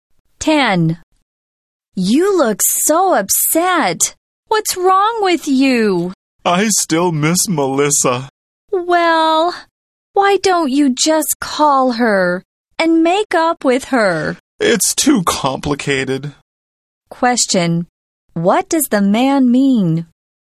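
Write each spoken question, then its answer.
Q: What does the man mean?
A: Making up with Melissa is too complicated; he won't just call her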